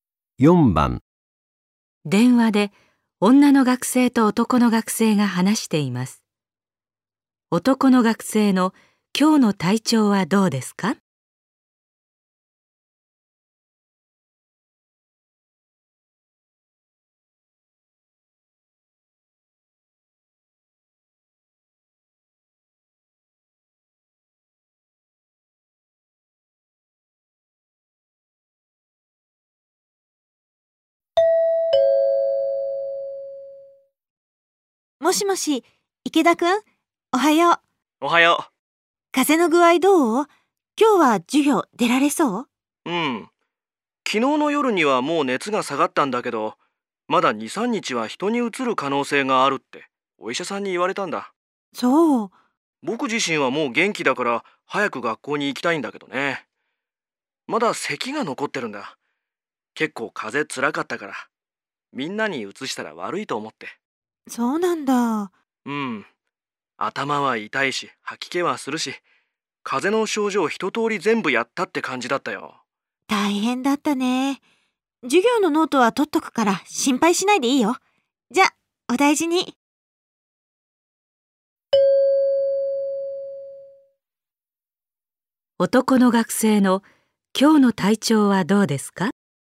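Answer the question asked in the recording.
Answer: 熱は下がって元気だが、まだ咳が残っている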